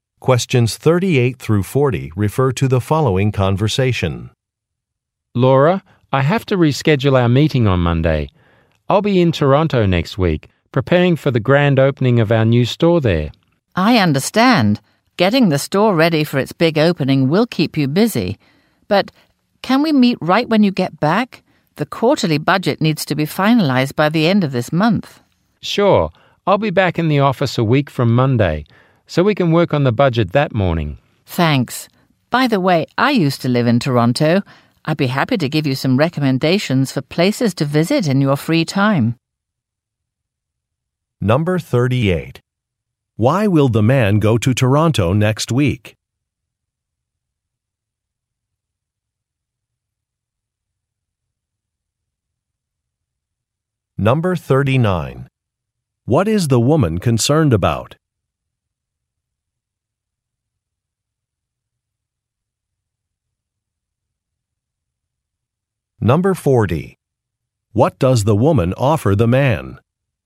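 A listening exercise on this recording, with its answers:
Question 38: Why will the man go to Toronto next week?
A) To organize a store opening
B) To attend a training session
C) To recruit job candidates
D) To inspect production facilities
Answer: A) To organize a store opening

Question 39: What is the woman concerned about?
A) Arranging a travel itinerary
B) Meeting a deadline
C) Managing a team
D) Giving an acceptance speech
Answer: B) Meeting a deadline

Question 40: What does the woman offer the man?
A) Tourism advice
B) Assistance with a client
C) A ride to the airport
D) Financial recommendations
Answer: A) Tourism advice

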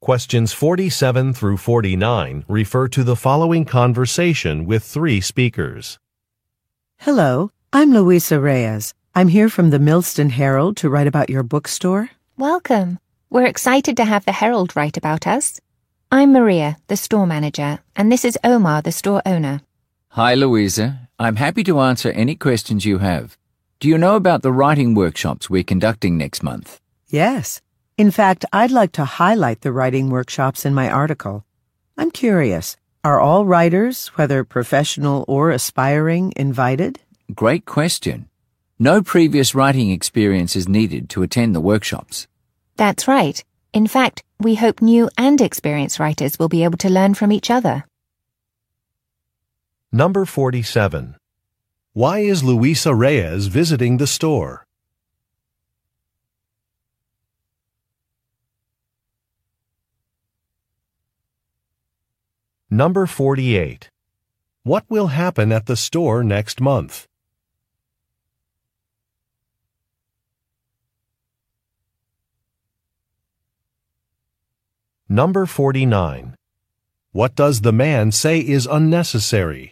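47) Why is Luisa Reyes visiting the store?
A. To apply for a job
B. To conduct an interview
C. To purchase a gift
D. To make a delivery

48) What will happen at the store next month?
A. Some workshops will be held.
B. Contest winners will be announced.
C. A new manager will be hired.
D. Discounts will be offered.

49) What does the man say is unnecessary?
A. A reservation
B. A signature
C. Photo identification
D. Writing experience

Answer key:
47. B. To conduct an interview
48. A. Some workshops will be held.
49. D. Writing experience

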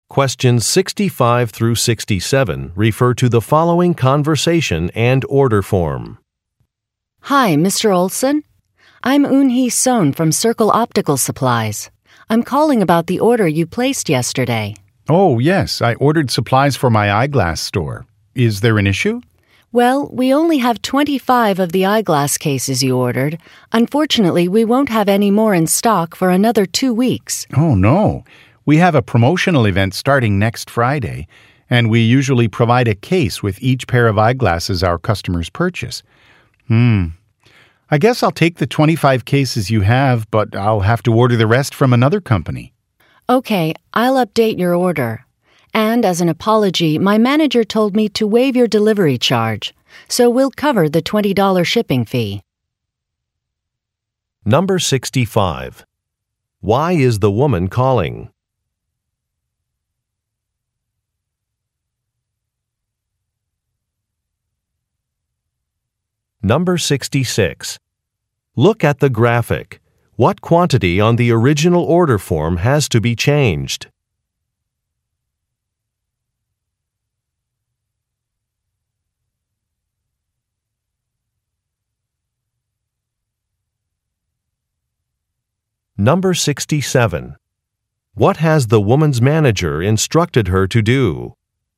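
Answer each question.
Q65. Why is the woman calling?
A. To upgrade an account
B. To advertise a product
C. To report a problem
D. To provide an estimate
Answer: C. To report a problem

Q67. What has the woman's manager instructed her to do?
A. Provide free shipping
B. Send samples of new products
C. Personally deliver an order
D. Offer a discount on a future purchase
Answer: A. Provide free shipping

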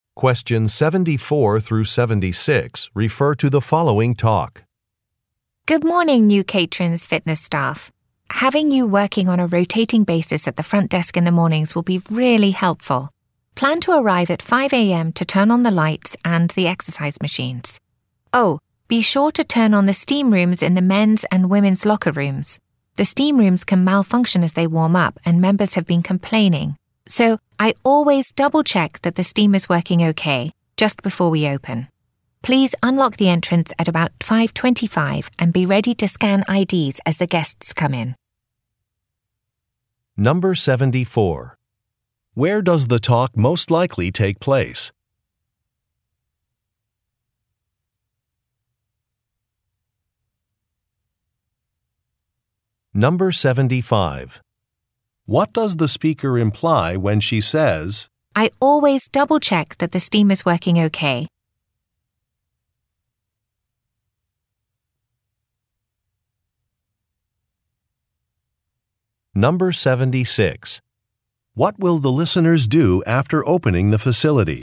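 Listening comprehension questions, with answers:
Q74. Where does the talk most likely take place?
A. At a physical therapy office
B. At a primary school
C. At a gym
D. At a hospital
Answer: C. At a gym

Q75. What does the speaker imply when she says, "I always double-check that the steam is working OK"?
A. She deserves a promotion.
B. She does not enjoy doing extra work.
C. Some complaints are unreasonable.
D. A task is important.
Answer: D. A task is important.

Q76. What will the listeners do after opening the facility?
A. Rent lockers to guests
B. Check membership identification cards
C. Fold towels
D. Answer phones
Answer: B. Check membership identification cards

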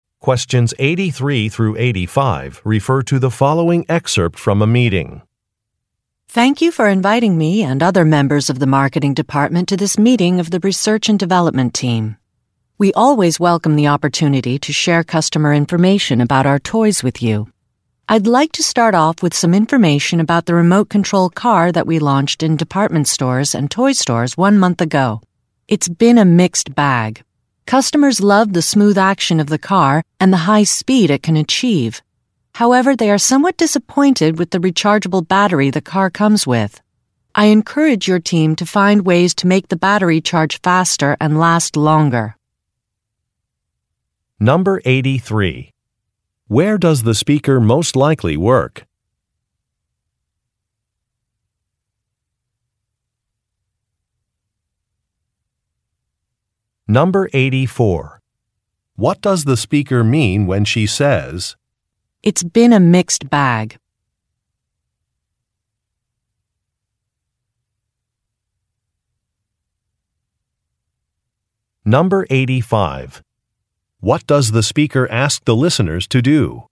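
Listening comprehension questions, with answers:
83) Where does the speaker most likely work?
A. At an automobile company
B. At a data analysis company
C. At a toy manufacturer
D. At a department store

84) What does the speaker mean when she says, "It's been a mixed bag"?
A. The product she is discussing cannot be returned for a refund.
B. Customers often purchase more than one of the product.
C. A competitor has developed a similar product.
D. A product has had both positive and negative reviews.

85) What does the speaker ask the listeners to do?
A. Try using the product she is discussing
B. Improve one part of the product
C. Get more information from customers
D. Collaborate with the marketing team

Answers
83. C. At a toy manufacturer
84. D. A product has had both positive and negative reviews.
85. B. Improve one part of the product

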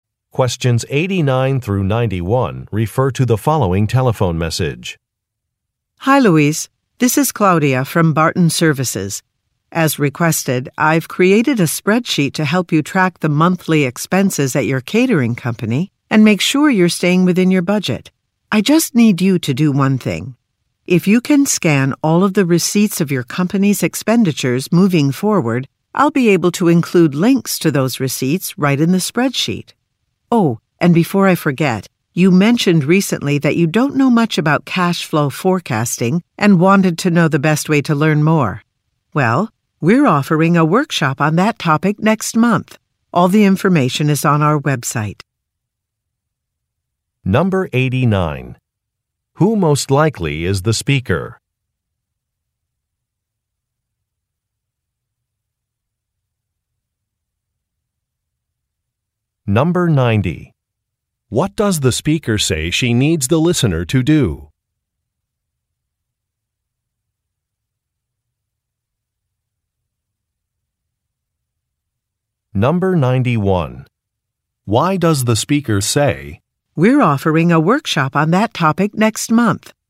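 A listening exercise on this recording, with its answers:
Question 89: Who most likely is the speaker?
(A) A journalist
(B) An accountant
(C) A restaurant owner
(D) A customer service representative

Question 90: What does the speaker say she needs the listener to do?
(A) Contact some clients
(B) Check an inventory list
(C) Create a marketing campaign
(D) Scan some information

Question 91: Why does the speaker say, "we're offering a workshop on that topic next month"?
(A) To reject an invitation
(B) To explain a delay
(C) To make a recommendation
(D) To ask for help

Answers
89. (B) An accountant
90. (D) Scan some information
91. (C) To make a recommendation

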